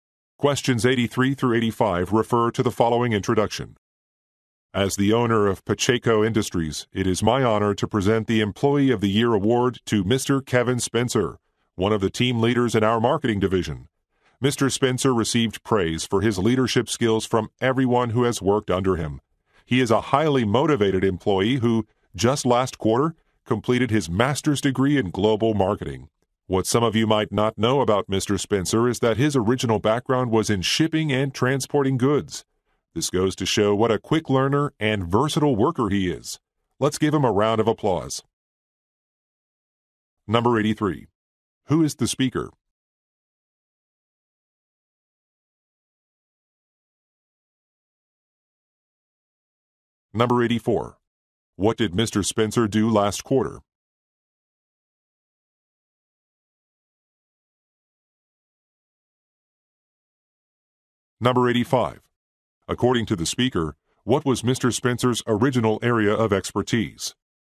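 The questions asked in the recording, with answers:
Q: Who is the speaker?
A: The owner of Pacheco Industries

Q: What did Mr. Spencer do last quarter?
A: Completed a master's degree

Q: According to the speaker, what was Mr.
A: Shipping and transporting goods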